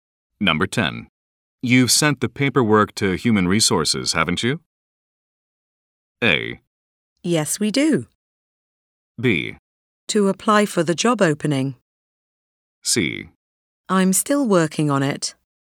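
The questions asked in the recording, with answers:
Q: You've sent the paperwork to Human Resources, haven't you?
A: C: I'm still working on it.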